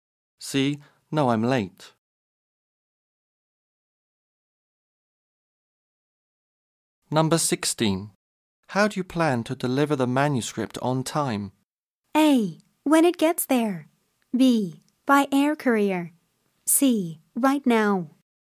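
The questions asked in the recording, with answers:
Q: How do you plan to deliver the manuscript on time?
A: B: By air courier.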